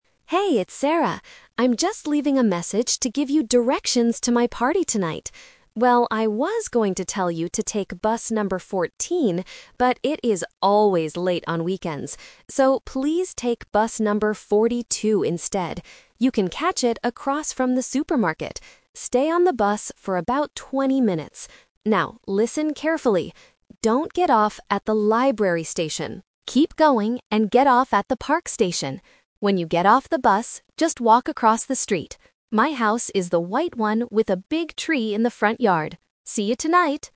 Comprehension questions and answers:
Listen to a voicemail message from a friend giving directions to a party. Choose the correct answer (A, B, or C) for each question.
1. Which bus should the listener take?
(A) Bus number 14.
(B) Bus number 42.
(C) Bus number 20.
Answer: Bus number 42.

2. Where should the listener get off the bus?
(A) At the library station.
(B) At the supermarket.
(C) At the park station.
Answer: At the park station.

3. What does Sarah's house look like?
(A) It is white with a big tree.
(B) It is next to the library.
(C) It is across from the supermarket.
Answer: It is white with a big tree.

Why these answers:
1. The Key: Sarah explicitly gives the new instruction: "So, please take bus number 42 instead." The Trap: Option (A) is the "Twist" trap. She was going to suggest bus 14, but changed her mind because it's always late. Option (C) is a distractor using the number "twenty," which is the time spent on the bus, not the bus number.
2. The Key: The direct instruction is: "Keep going and get off at the park station." The Trap: Option (A) is explicitly warned against: "don't get off at the library station." Option (B) is where the listener catches the bus, not where they get off.
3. The Key: Sarah describes her house at the end: "My house is the white one with a big tree in the front yard." The Trap: Options (B) and (C) use landmarks mentioned earlier in the audio to confuse listeners who try to guess the answer without listening to the final sentence.

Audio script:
I'm just leaving a message to give you directions to my party tonight. Well, I was going to tell you to take bus number 14, but it is always late on weekends. So, please take bus number 42 instead. You can catch it across from the supermarket. Stay on the bus for about twenty minutes. Now, listen carefully: don't get off at the library station. Keep going and get off at the park station. When you get off the bus, just walk across the street. My house is the white one with a big tree in the front yard. See you tonight!

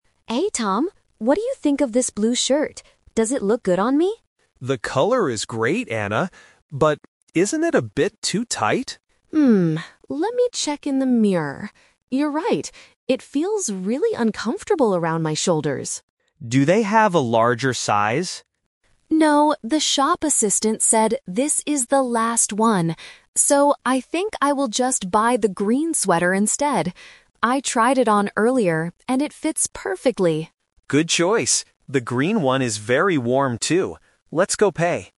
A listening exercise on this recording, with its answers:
Listen to the conversation and choose the correct answer (A, B, or C) for each question.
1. What is the problem with the blue shirt?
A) The color is not nice.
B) It is too small.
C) It is too expensive.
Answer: It is too small.

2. Why can't Anna get a larger blue shirt?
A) Because she doesn't have enough money.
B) Because Tom doesn't like the style.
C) Because there are no more in the store.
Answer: Because there are no more in the store.

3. What will Anna finally buy?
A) A green sweater.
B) A blue shirt.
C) A winter jacket.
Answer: A green sweater.

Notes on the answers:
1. Tom says the shirt is "too tight," and Anna agrees that it feels "uncomfortable around my shoulders." "Tight" means small. Why the trap is wrong: Option (A) is a trap because Tom clearly says "The color is great." Option (C) is plausible in a shopping context but they never talk about the price.
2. When Tom asks about a larger size, Anna answers, "the shop assistant said this is the last one." Why the trap is wrong: Options (A) and (B) are not mentioned. Tom actually likes the shirt, but they just can't find a bigger one.
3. This is "The Twist". Anna changes her plan and says, "I will just buy the green sweater instead." Why the trap is wrong: Option (B) "A blue shirt" is the trap. She is wearing it right now, but she cannot buy it because it doesn't fit. Option (C) is not mentioned.

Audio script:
Anna: Hey Tom, what do you think of this blue shirt? Does it look good on me?
Tom: The color is great, Anna. But... isn't it a bit too tight?
let me check in the mirror. You're right. It feels really uncomfortable around my shoulders.
Tom: Do they have a larger size?
Anna: No, the shop assistant said this is the last one. So, I think I will just buy the green sweater instead. I tried it on earlier, and it fits perfectly.

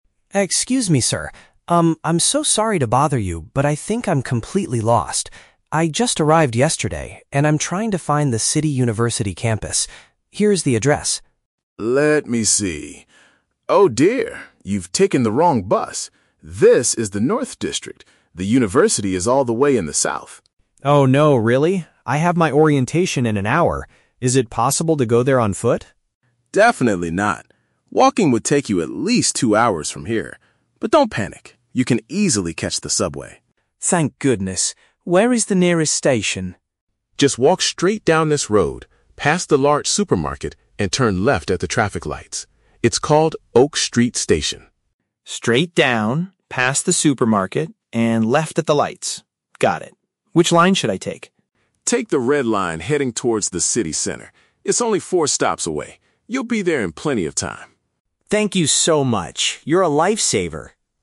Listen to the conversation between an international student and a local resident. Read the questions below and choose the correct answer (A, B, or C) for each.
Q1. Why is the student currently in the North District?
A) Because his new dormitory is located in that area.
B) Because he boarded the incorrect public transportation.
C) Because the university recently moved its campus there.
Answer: Because he boarded the incorrect public transportation.

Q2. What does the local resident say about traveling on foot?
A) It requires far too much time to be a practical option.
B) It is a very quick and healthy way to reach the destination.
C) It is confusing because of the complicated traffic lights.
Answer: It requires far too much time to be a practical option.

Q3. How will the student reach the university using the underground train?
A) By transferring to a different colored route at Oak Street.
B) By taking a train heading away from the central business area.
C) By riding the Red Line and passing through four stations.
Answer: By riding the Red Line and passing through four stations.

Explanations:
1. The Key (Correct): The local resident tells the student, "you've taken the wrong bus!" (Paraphrased: taken the wrong bus = boarded the incorrect public transportation). The Trap: Option (C) mentions the university, but the university is actually in the South, not the North. Not mentioned: Option (A) is a plausible reason for a student to be somewhere, but his dormitory is not mentioned in the dialogue.
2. The Key (Correct): When the student asks if he can go "on foot" (walking), the local says "Definitely not" because it would "take you at least two hours." (Paraphrased: take at least two hours = requires far too much time). The Trap: Option (C) mentions "traffic lights," but the traffic lights are simply a landmark for finding the subway station, not a reason why walking to the campus is a bad idea. Not mentioned: Option (B) is the opposite of the truth. Walking is not quick in this situation.
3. The Key (Correct): The local advises him to "Take the Red Line" and says "It's only four stops away." (Paraphrased: four stops = four stations). The Trap: Option (B) is incorrect because the local tells him to take the train "heading towards the city center," not away from it. Not mentioned: Option (A) uses the location "Oak Street" (the name of the station), but transferring lines is never mentioned.

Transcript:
Student: Excuse me, sir. Um, I'm so sorry to bother you, but I think I'm completely lost. I just arrived yesterday, and I'm trying to find the City University campus. Here is the address.
Local: Let me see... Oh dear, you've taken the wrong bus! This is the North District. The university is all the way in the South.
Student: Oh no, really? I have my orientation in an hour. Is it possible to go there on foot?
Local: Definitely not. Walking would take you at least two hours from here. But don't panic. You can easily catch the subway.
Student: Thank goodness. Where is the nearest station?
Local: Just walk straight down this road, past the large supermarket, and turn left at the traffic lights. It's called Oak Street Station.
Student: Straight down, past the supermarket, and left at the lights. Got it. Which line should I take?
Local: Take the Red Line heading towards the city center. It's only four stops away. You'll be there in plenty of time.

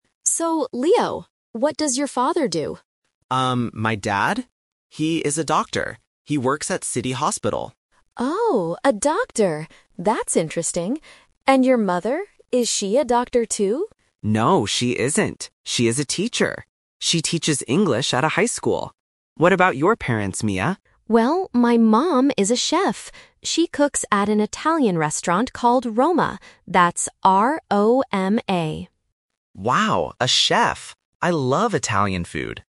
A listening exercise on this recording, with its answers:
Listen to the conversation between two new friends. Choose the correct answer (A, B, or C) for each question.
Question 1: What is Leo's father's job?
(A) A teacher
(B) A doctor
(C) A driver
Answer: A doctor

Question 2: What does Leo's mother teach?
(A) English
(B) Italian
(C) Math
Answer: English

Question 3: Where does Mia's mother work?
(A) At City Hospital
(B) At a high school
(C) At an Italian restaurant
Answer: At an Italian restaurant

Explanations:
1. Leo clearly says "He is a doctor". Option (A) is the trap because "teacher" is mentioned, but it is his mother's job, not his father's. Option (C) is not mentioned in the audio.
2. Leo says his mother "teaches English". Option (B) is the trap because the word "Italian" is heard later in the audio (Italian restaurant/food), but it is not what she teaches. Option (C) is not mentioned.
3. Mia says her mom cooks at an "Italian restaurant called Roma". Option (A) and (B) are traps because they are mentioned in the audio, but they are the workplaces of Leo's father and mother, not Mia's mother.

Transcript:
Mia: So, Leo, what does your father do?
Leo: Um, my dad? He is a doctor. He works at City Hospital.
Mia: Oh, a doctor. That's interesting! And your mother? Is she a doctor, too?
Leo: No, she isn't. She is a teacher. She teaches English at a high school. What about your parents, Mia?
Mia: Well, my mom is a chef. She cooks at an Italian restaurant called Roma.
Leo: Wow, a chef! I love Italian food.

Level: A1

